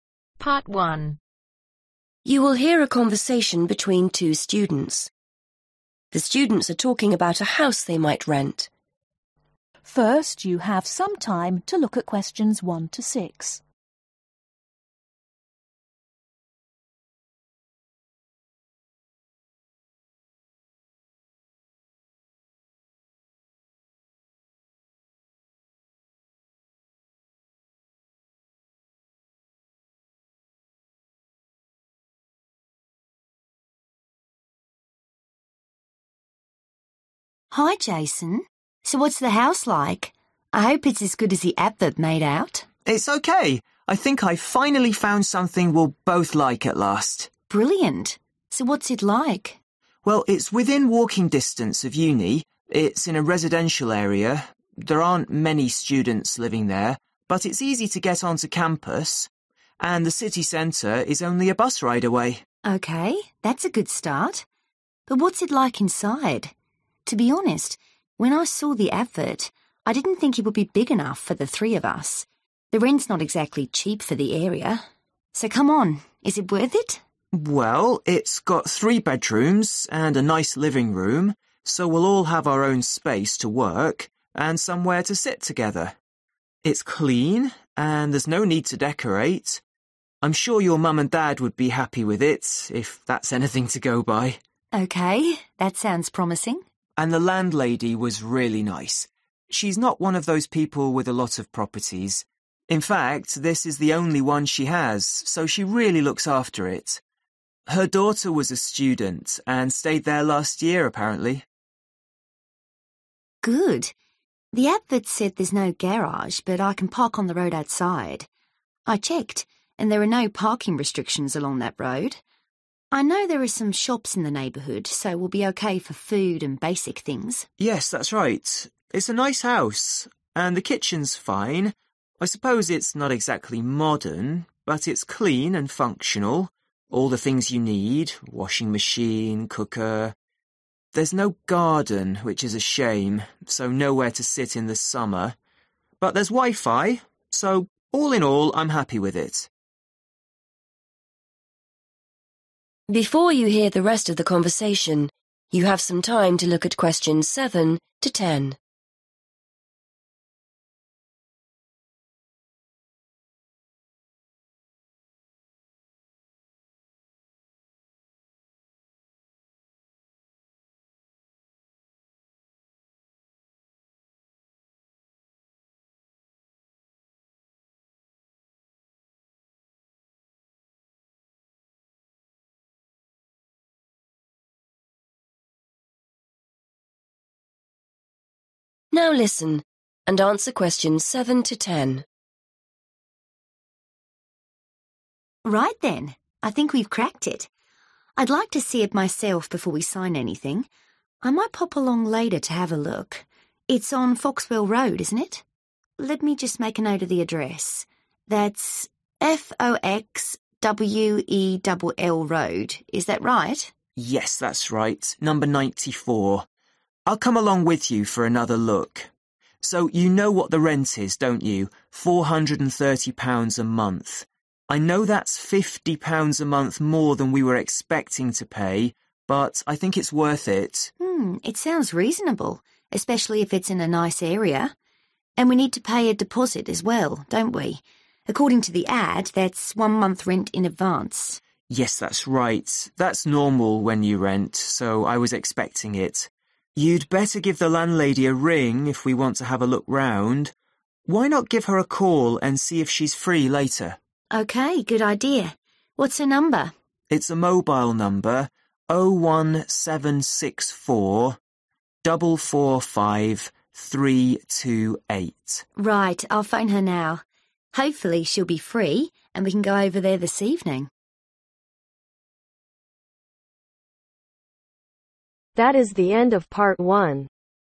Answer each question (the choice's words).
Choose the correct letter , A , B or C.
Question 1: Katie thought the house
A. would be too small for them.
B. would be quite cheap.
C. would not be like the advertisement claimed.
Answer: would be too small for them.

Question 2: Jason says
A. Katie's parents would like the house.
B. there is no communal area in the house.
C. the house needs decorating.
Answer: Katie's parents would like the house.

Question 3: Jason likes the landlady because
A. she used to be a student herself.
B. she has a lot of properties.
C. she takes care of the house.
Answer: she takes care of the house.

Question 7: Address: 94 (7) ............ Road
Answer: Foxwell

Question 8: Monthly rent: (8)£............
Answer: 430

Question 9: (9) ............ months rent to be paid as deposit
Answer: 1

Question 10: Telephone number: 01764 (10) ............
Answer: 445328